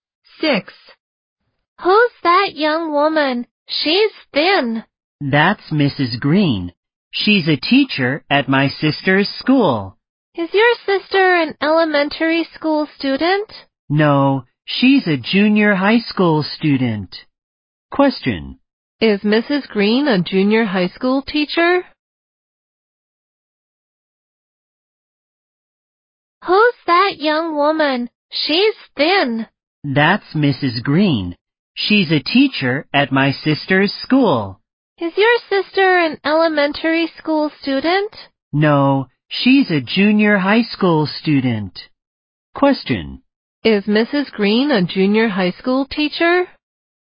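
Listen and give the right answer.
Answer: Yes, she is.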